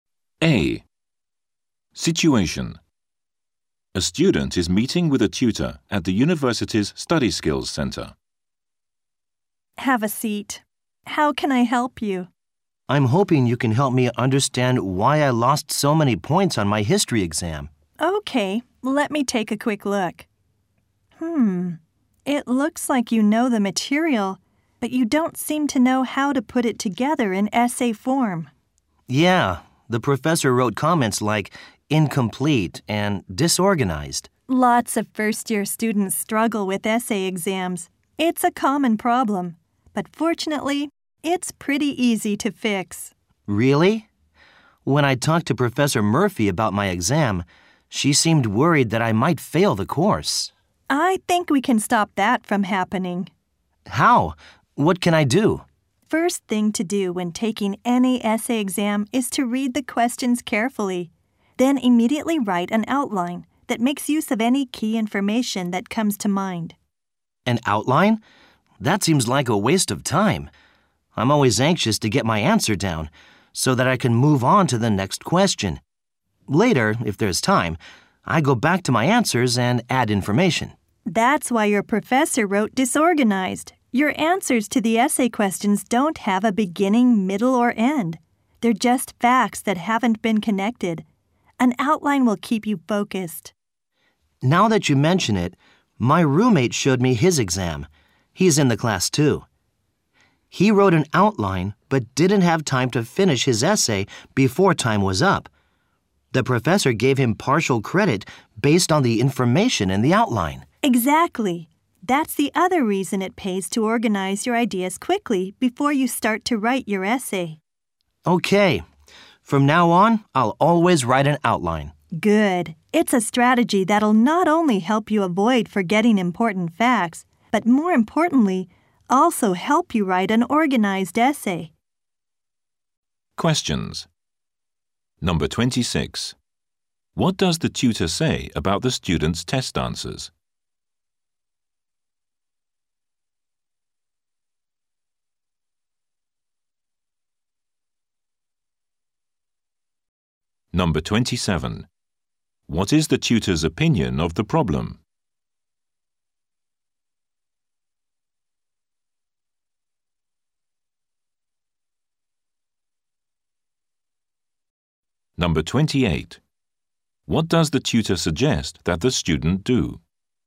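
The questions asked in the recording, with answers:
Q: What does the tutor say about the student's test answers?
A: They are disorganized; facts are not connected into an essay.

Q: What is the tutor's opinion of the problem?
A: It is common and easy to fix.

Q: What does the tutor suggest that the student do?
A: Write an outline before writing the essay.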